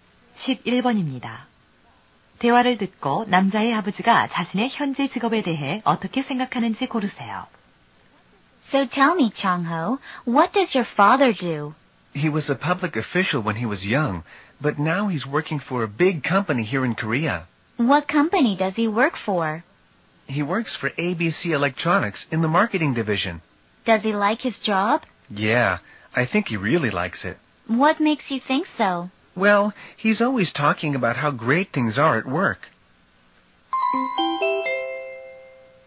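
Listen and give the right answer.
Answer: 아주 만족한다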